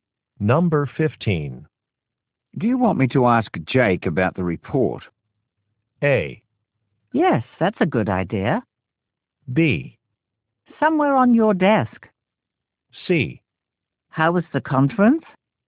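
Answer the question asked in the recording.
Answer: A: Yes, that's a good idea.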